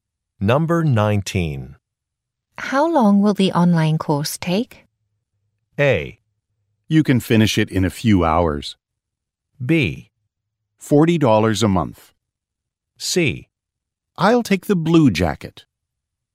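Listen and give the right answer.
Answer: A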